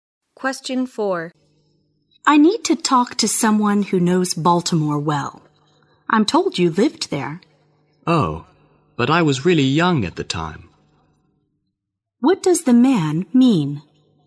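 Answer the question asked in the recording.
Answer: He doesn't know Baltimore well; he was very young when he lived there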